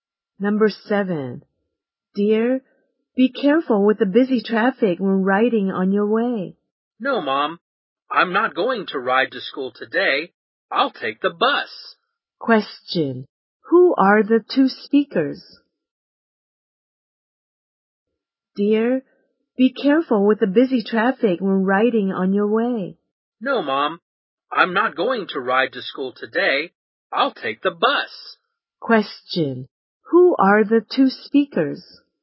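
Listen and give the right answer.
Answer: Mother and child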